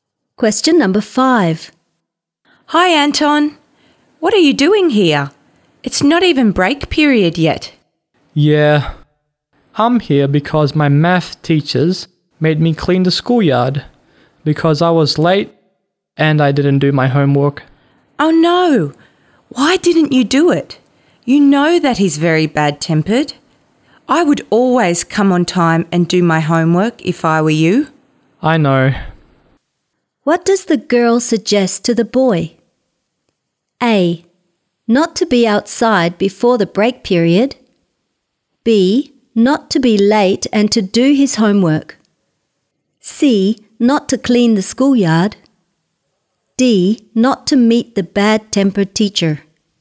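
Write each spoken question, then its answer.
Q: What does the girl suggest to the boy?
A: B: Not to be late and to do his homework.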